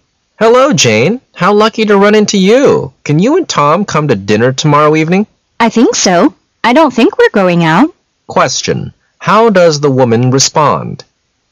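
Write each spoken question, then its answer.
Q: How does the woman respond?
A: She thinks they can come to dinner.

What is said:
[解析] M: Hello, Jane. How lucky to run into you! Can you and Tom come to dinner tomorrow evening? W: I think so. I don't think we're going out. Q: How does the woman respond?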